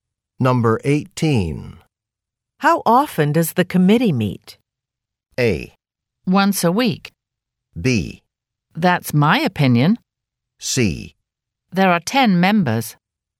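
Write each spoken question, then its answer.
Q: How often does the committee meet?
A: A: Once a week.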